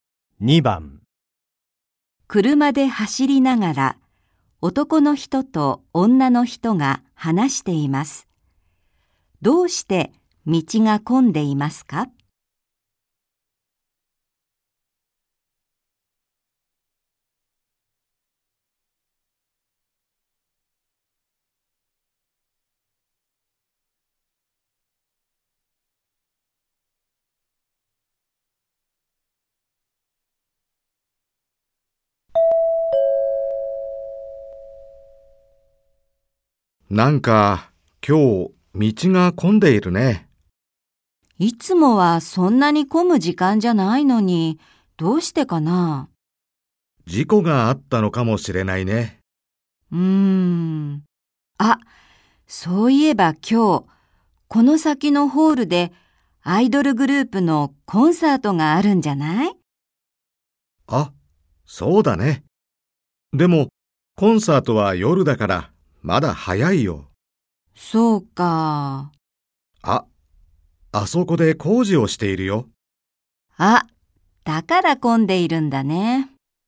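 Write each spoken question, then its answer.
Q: どうして道が混んでいますか?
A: 工事をしているから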